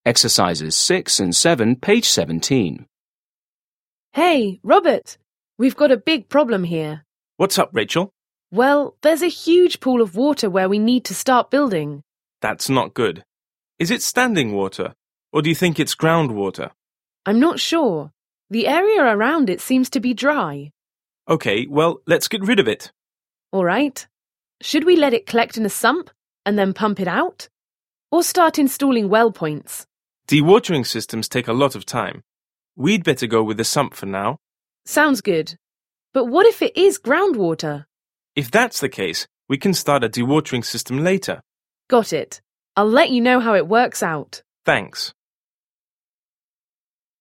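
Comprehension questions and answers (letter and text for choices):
7. Listen again and complete the conversation.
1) Manager: 1 ____ ___ Rachel?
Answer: What's up

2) Worker: Well, there's a huge pool of water where we 2 _________ ________ start building.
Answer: need to

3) Manager: That's 3 ____________ ___________ is it standing water? Or do you think it's groundwater?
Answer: not good

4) Worker: I'm 4 ___________ ___________. The area around it seems to be dry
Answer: not sure

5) Manager: Okay, well, let's 5 ________ _______ ________ it.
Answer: get rid of

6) Worker: All right. 6 ____________ ____________ let it collect in a sump and then pump it out? Or star installing well-points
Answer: Should we

6. Listen to a conversation between a construction worker and a project manager. Choose the correct answers.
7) What is the conversation mainly about?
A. a problem with a sump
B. why a new well-point is needed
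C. how to remove water from a site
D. the success of a dewatering system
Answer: C. how to remove water from a site

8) What will the woman mostly likely do next?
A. install a sump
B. begin construction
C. remove the well-point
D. replace the broken equipment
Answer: A. install a sump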